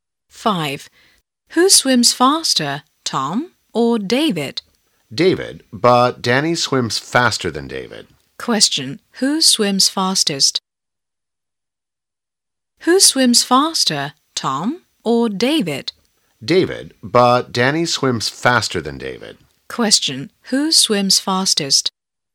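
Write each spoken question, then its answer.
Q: Who swims fastest?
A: Danny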